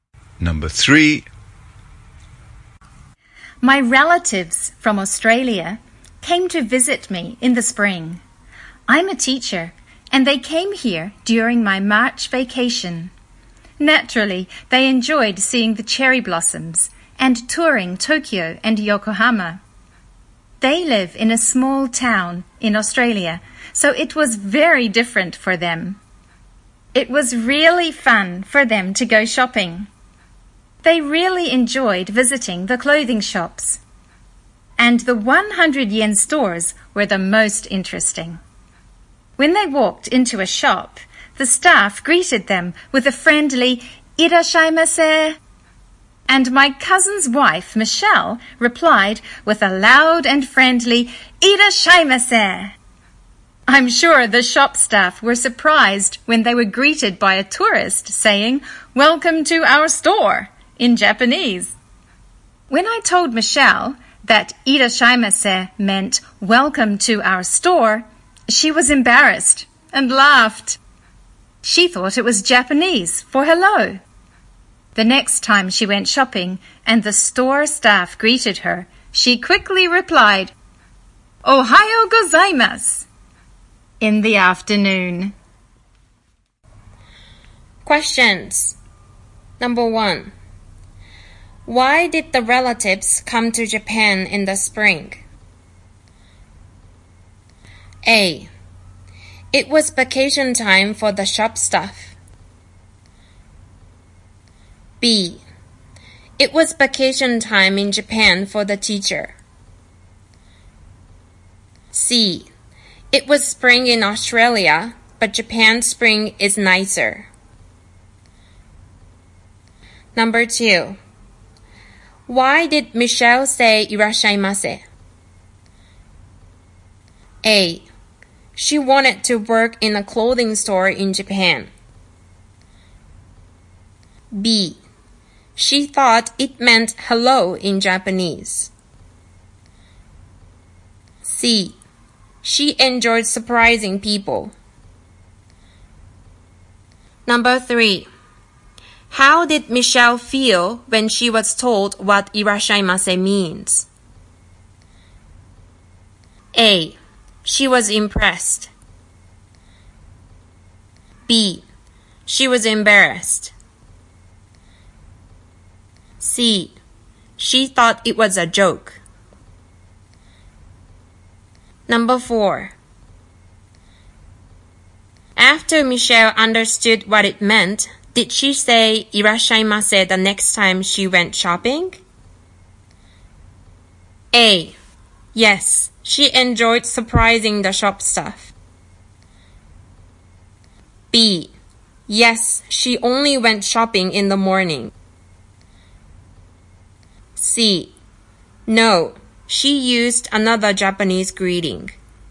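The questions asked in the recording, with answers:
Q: Why did the relatives come to Japan in the spring?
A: B: It was vacation time in Japan for the teacher.

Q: Why did Michelle say "Irashaimase"?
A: B: She thought it meant hello in Japanese.

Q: How did Michelle feel when she was told what "Irashaimase" means?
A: B: She was embarrassed.

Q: After Michelle understood what it meant, did she say "いらっしゃいませ" the next time she went shopping?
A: C: No, she used another Japanese greeting.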